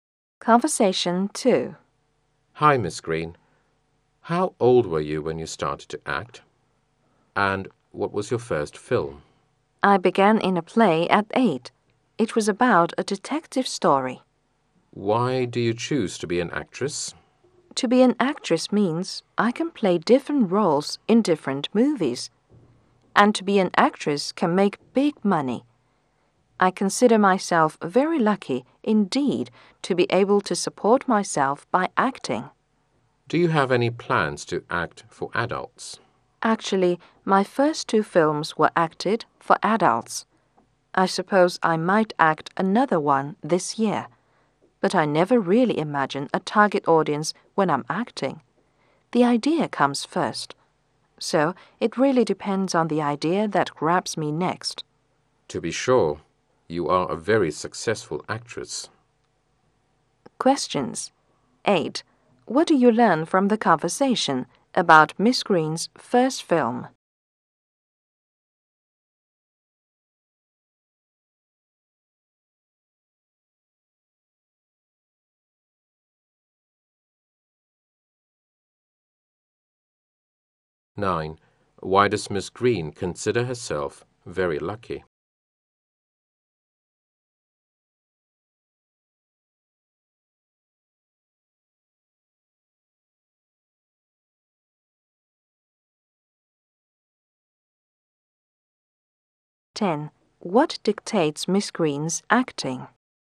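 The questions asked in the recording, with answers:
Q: What do you learn from the conversation about Miss Green's first film.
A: It was a detective story for adults

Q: Why does Miss Green consider herself very lucky?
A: She can support herself by acting

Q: What dictates Miss Green's acting?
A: The idea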